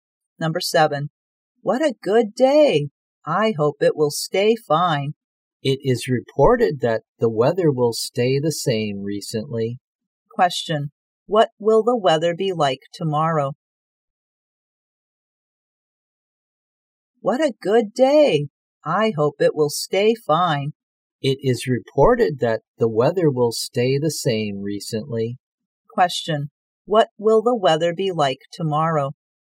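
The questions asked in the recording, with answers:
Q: Question, what will the weather be like tomorrow?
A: Fine/sunny.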